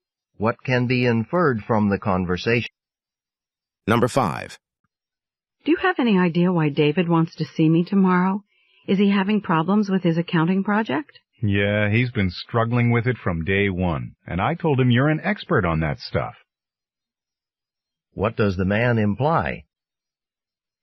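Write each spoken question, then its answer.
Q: What does the man imply?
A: David wants the woman's help with his accounting project.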